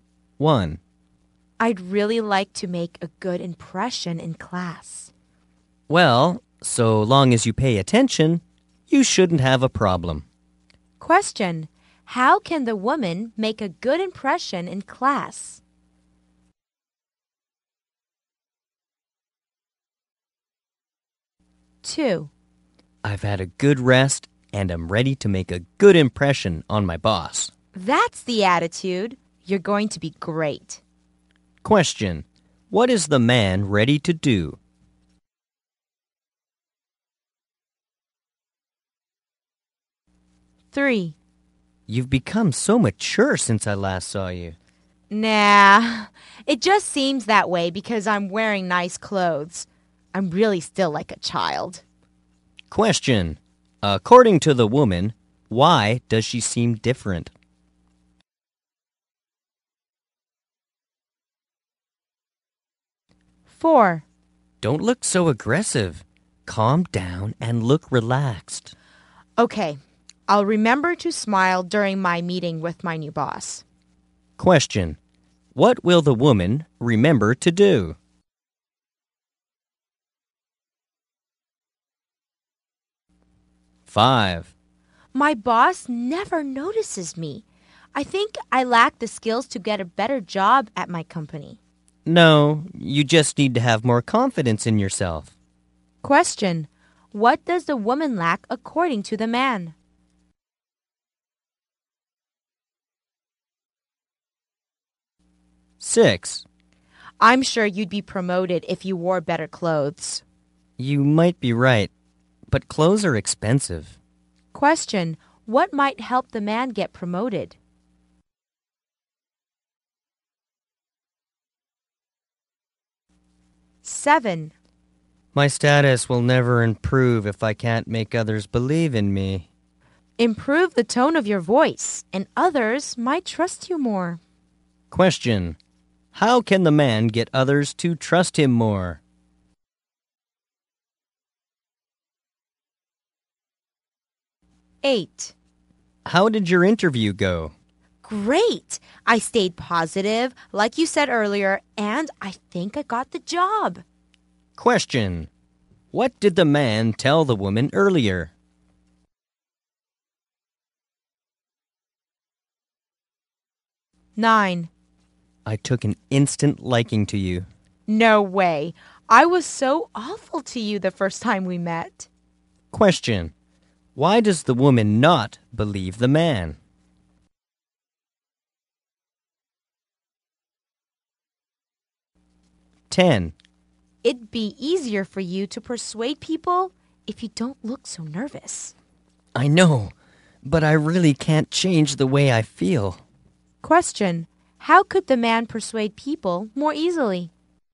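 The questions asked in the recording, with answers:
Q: How can the woman make a good impression in class?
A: By paying attention

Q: What is the man ready to do?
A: Make a good impression on his boss

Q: According to the woman, why does she seem different?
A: Because she is wearing nice clothes

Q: What will the woman remember to do?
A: Smile during her meeting with her new boss

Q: What does the woman lack according to the man?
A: Confidence in herself

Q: What might help the man get promoted?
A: Wearing better clothes

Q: How can the man get others to trust him more?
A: By improving the tone of his voice

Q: What did the man tell the woman earlier?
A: To stay positive

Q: Why does the woman not believe the man?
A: She was awful to him the first time they met

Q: How could the man persuade people more easily?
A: By not looking so nervous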